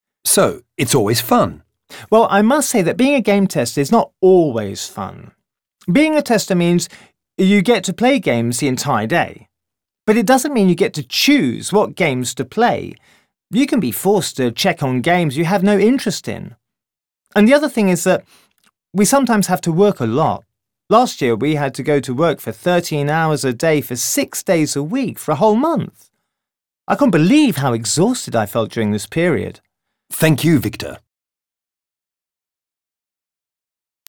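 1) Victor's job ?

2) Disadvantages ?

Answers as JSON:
{"1": "Game tester", "2": "He can't choose which games to play and sometimes has to work very long hours (13 hours a day, 6 days a week for a month)."}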